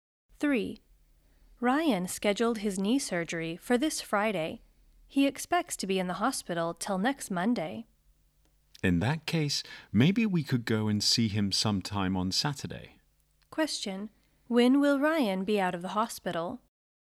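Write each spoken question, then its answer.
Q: When will Ryan be out of the hospital?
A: Next Monday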